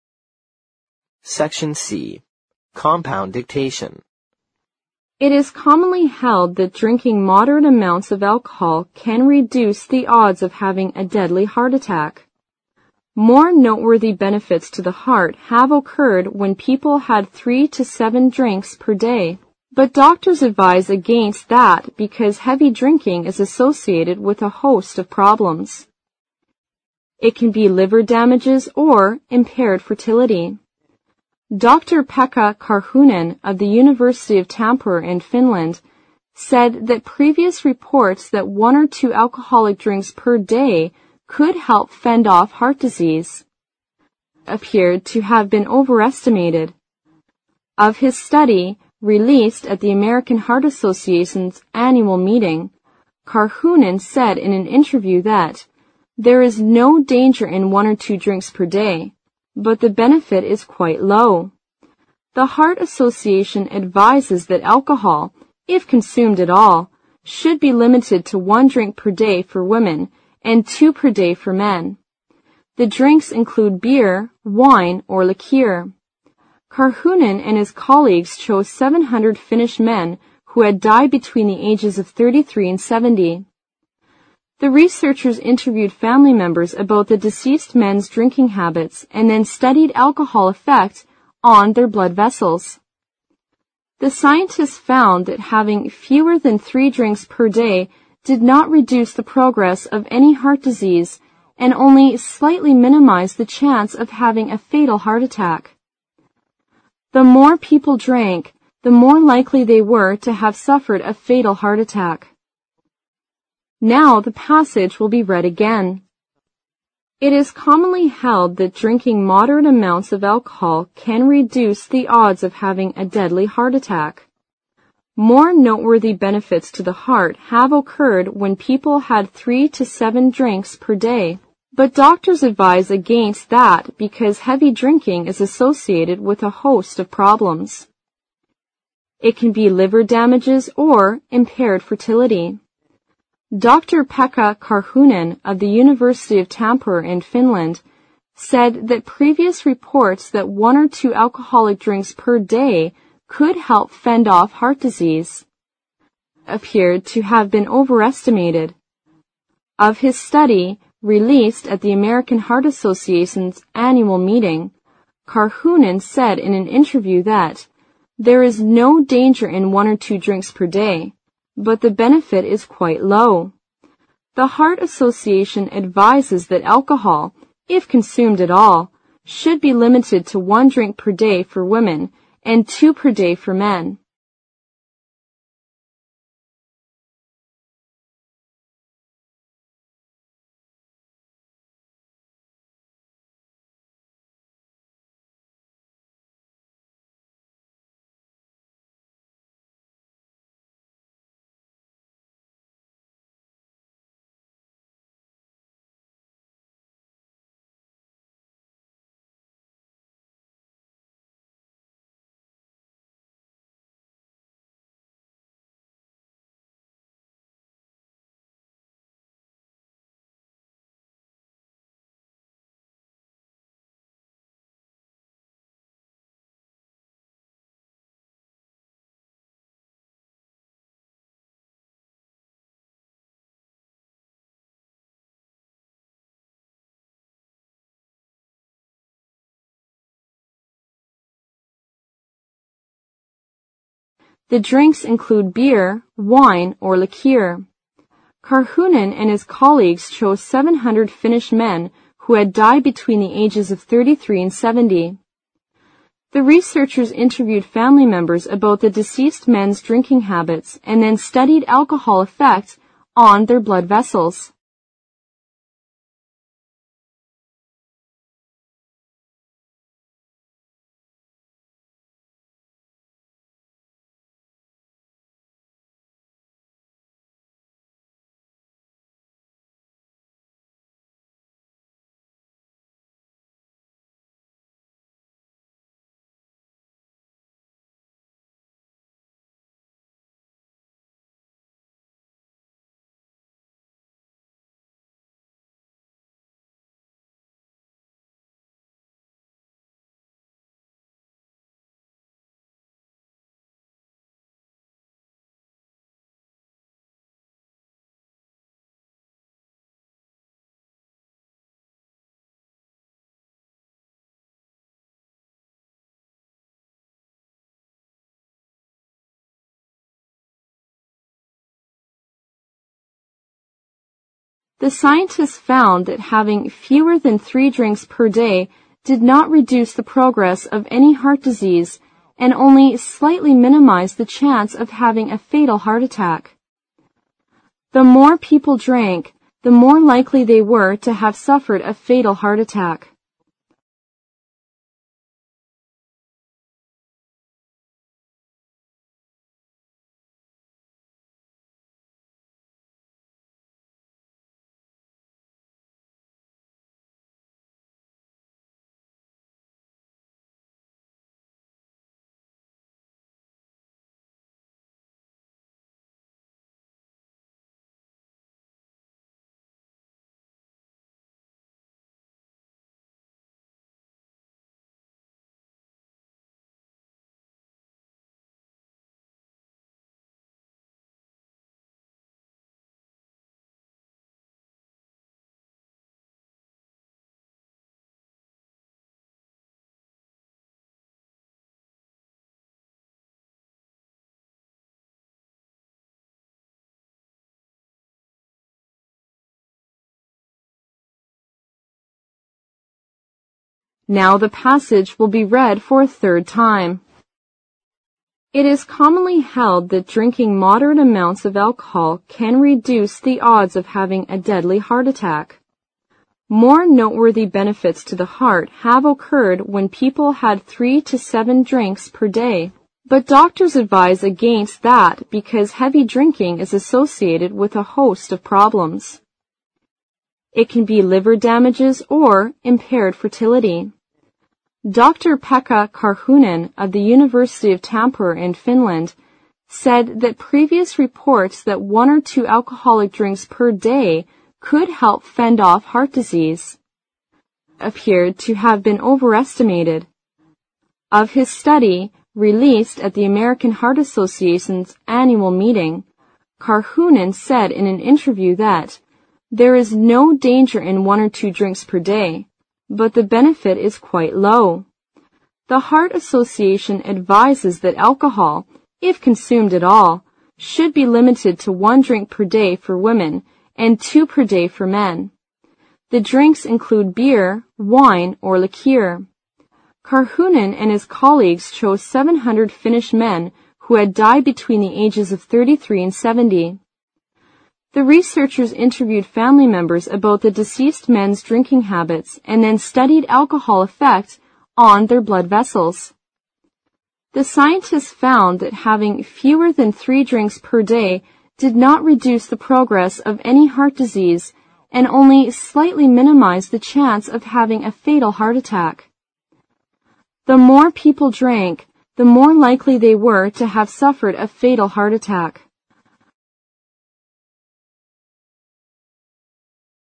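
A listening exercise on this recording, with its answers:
Section C Compound Dictation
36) More (36) ______ benefits to the heart have (37) ______ when people had three to seven drinks per day.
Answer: noteworthy

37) More (36) ______ benefits to the heart have (37) ______ when people had three to seven drinks per day.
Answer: occurred

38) But doctors advise against that because heavy drinking is associated with a (38) ______ of problems.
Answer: host

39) It can be liver damages or (39) fertility.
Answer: impaired

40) said that (40) ______ reports that one or two alcoholic drinks per day could help (41) ______ off heart disease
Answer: previous

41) said that (40) ______ reports that one or two alcoholic drinks per day could help (41) ______ off heart disease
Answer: fend

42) appeared to have been "(42) ______ ".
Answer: overestimated

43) Of his study, released at the American Heart Associations (43) ______ meeting,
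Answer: annual

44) (44) ______________________________________________________________________ .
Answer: The Heart Association advises that alcohol, if consumed at all, should be limited to 1 drink per day for women and 2 per day for men

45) The researchers (45) __________________________________________________________________________ .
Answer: interviewed family members about the deceased men's drinking habits and then studied alcohol effect on their blood vessels

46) (46) ___________________________________________________________________ .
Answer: The more people drank, the more likely they were to have suffered a fatal heart attack

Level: 六级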